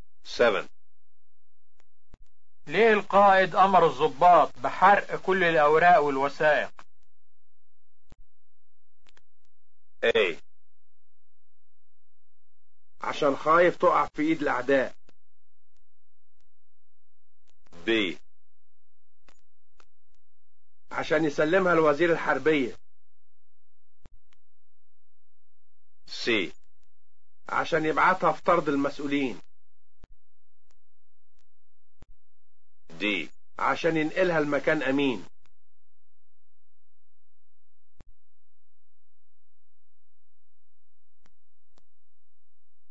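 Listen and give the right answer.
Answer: A: عشان خايف تقع في ايد الاعداء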